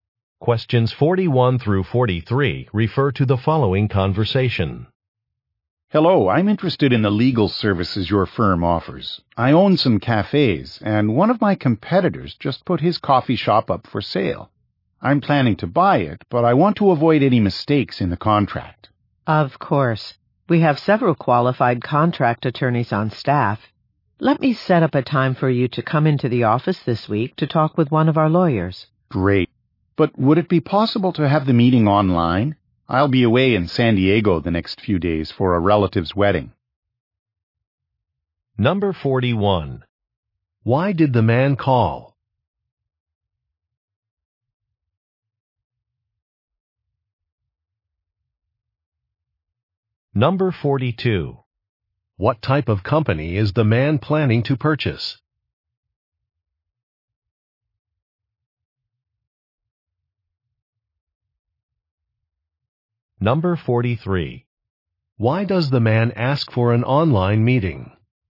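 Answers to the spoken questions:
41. To get legal help with a purchase contract
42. A coffee shop
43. He'll be away in San Diego for a relative's wedding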